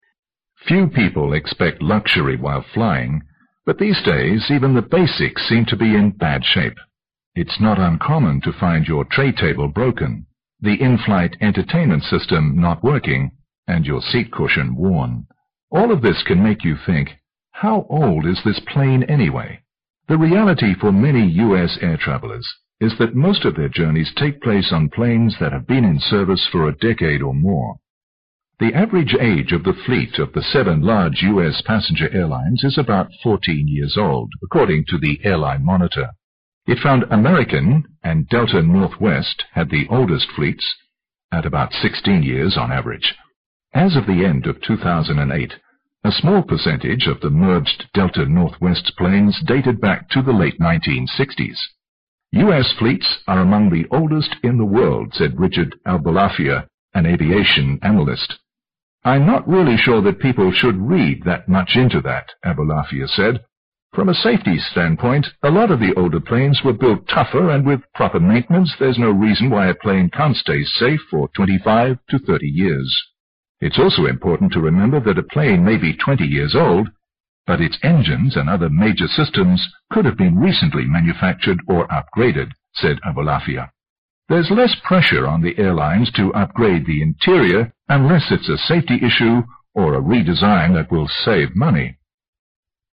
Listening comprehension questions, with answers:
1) According to the passage, the average age of the fleet of Delta/Northwest is ______.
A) 10 years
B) 14 years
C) 16 years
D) 20 years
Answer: C) 16 years

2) It can be learned from the passage that ______.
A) air journeys are quite often far from comfortable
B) air travelers usually enjoy luxury during flight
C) air travelers usually enjoy upgraded conditions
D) airlines always provide good in-flight entertainment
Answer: A) air journeys are quite often far from comfortable

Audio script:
[听力原文] Few people expect luxury while flying, but these days, even the basic seems to be in bad shape. It's not uncommon to find your trade table broken, the in-flight entertainment system not working and your seat cushion worn. All of this can make you think how old is this plane anyway. The reality for many US air travelers is that most of their journeys take place on planes that have been in service for a decade or more. The average age of the fleet of the seven large USA passenger airlines is about 14 years old according to the airline monitor. It found American and Delta Northwest have the oldest fleets at about 16 years on average. At the end of 2008, a small percentage of the merged Delta Northwest planes dated back to the late 1960s. fleets are among the oldest in the world," said Richard Albelafia, an elevation analyst, "I'm not really sure that people should read that much into that." AIbelafia said, "For the safety's stand point, a lot of the old planes will build tougher and with proper maintenance. There's no reason why a plane can stay safe for 25 to 30 years. It's also important to remember that the plane may be 20 years old, but its engines and other major systems could be recently manufactured and upgraded." said Albelafia, "There's less pressure on the airlines to upgrade the interior unless the safety issue or redesign that will save money.

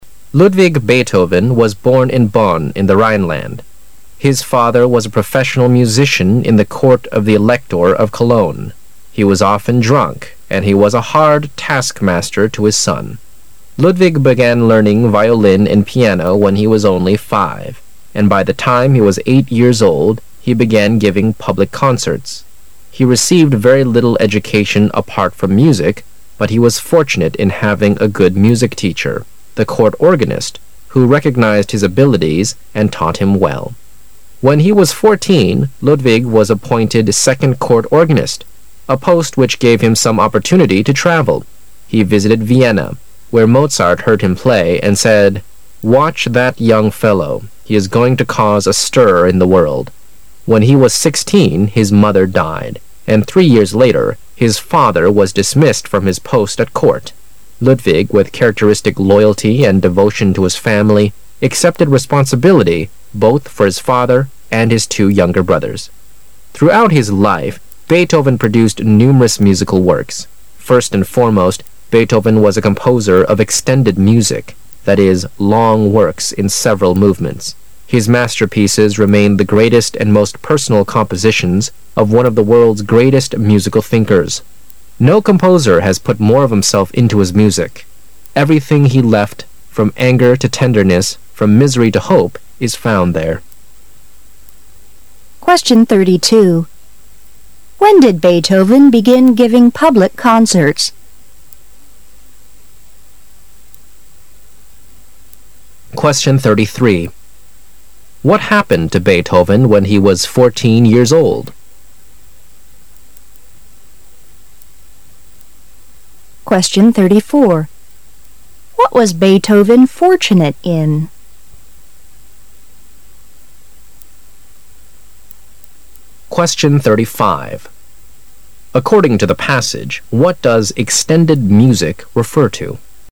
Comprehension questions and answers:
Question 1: What happened to Beethoven when he was fourteen years old?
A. He was given a chance to Vienna.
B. He met ,Mozart for the first time.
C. He supported his family by his performance.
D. He became a second court organist.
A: D. He became a second court organist.

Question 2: What was Beethoven fortunate in?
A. Having an outstanding father.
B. Having a tendering mother.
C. Having the court organist as his music teacher.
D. Having Mozart as his good friend.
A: C. Having the court organist as his music teacher.

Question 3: According to the passage,what does "extended music" refer to?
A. Long works in several movements.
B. Long works based on short pieces.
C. Excellent works praised by people.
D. Classical works lasting forever.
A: A. Long works in several movements.

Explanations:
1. 事实细节题。短文首段第五句指出"When he was 14,Ludwig was appointed second court organist,..." (十四岁时贝多芬被任命为第二宫廷风琴演奏者),故应选D)。
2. 事实细节题。文章首段第四句指出"... but he was fortunate in having a good music teacher,the court organist,..."(虽然除了音乐之外贝多芬没有受过什么教育,但他很幸运拥有一个非常优秀的音乐老师——当时的宫廷风琴手,这位老师看出了他的天赋并认真教导他。)由此可知,本题应选C)。
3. 事实细节题。最后一段第二句提到extended music,然后紧接着就做了解释"that is,long works in several movement"。由此可知,本题应选A)。

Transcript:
[解析] 32-35 Ludwig Beethoven was born in Bonn, in the Rhineland. His father was a professional musician in the Court of The Elector of Cologne; he was often drunk, and he was a hard task-master to his son. Ludwig began learning violin and piano when he was only 5, and by the time he was 8 years old the began giving public concerts. He received very little education apart from music, but he was fortunate in having a good music teacher, the court organist, who recognized his abilities and taught him well. When he was 14, Ludwig was appointed second court organist, a post which gave him some opportunity to travel. He visited Vienna, where Mozart heard him play and said, "Watch that young fellow; he is going to cause a stir in the world." When he was 16 his mother died, and three years later his father was dismissed from his post at Court. Ludwig, with characteristic loyalty and devotion to his family, accepted responsibility both for his father and his two younger brothers. Throughout his life Beethoven produced numerous musical works. First and foremost, Beethoven was a composer of extended music, that is, long works in several movements. His masterpieces remain the greatest and most personal compositions of one of the world's greatest musical thinkers. No composer has put more of himself into his music; everything he left, from anger to tenderness, from misery to hope is found there. When did Beethoven begin giving public concerts?

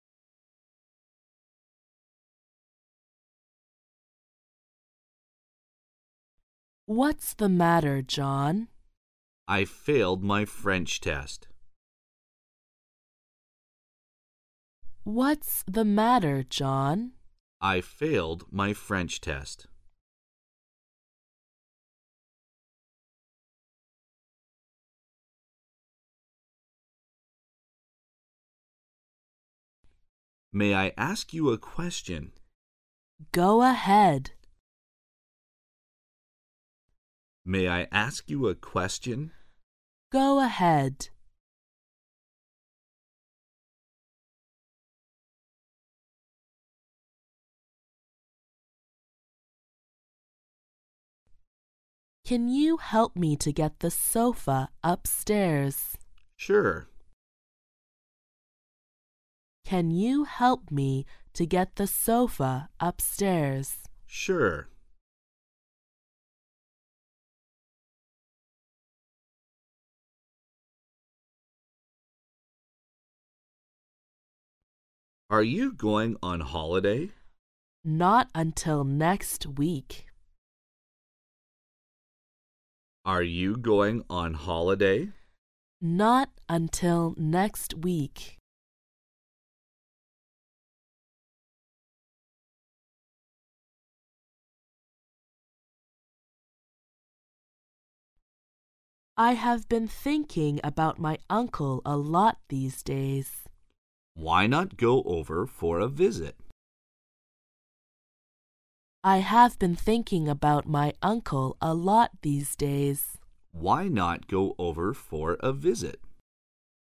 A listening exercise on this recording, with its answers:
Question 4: When is the man going on holiday?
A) This week.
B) Next week.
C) He will not go on holiday.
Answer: B) Next week.

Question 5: What does the man mean?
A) The woman's uncle will come for a visit.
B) He thinks the woman should visit her uncle.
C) He asks the woman to go over to his place.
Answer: B) He thinks the woman should visit her uncle.

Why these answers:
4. [听力原文] M: Are you going on holiday? W: Not until next week. Q: When is the man going on holiday? [句意] 这位男士什么时候去度假?对话中男士回答"Not until next week."Not until意为"直到...才..."。所以这位男士下周才去度假。故B项正确。
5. [听力原文] W: I have been thinking about my uncle a lot these days. M: Why not go over for a visit? Q: What does the man mean? [句意] 男士的话是什么意思?对话中那位女士说她最近很想她的叔叔,男士问"Why not go over for a visit?"Why not...?意为"为什么不...呢?"实际是在提建议,"为什么不去看看他呢?"故B项正确。

